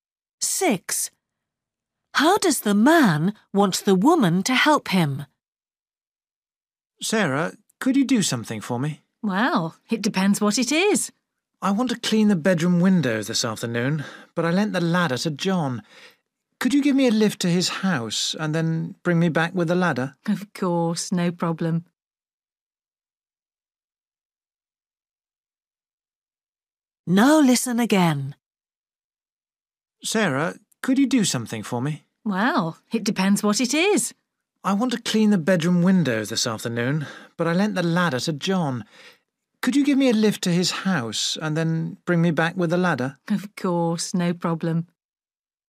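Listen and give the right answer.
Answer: Drive him to John's house to get the ladder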